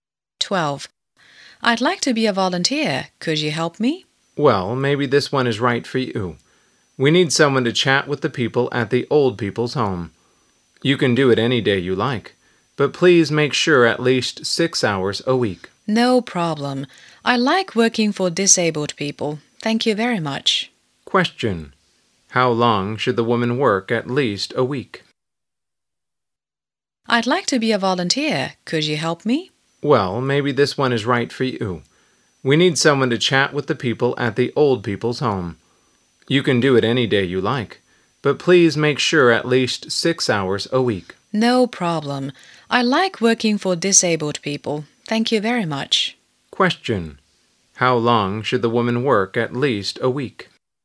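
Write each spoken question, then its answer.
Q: Question. How long should the woman work at least a week?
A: 6 hours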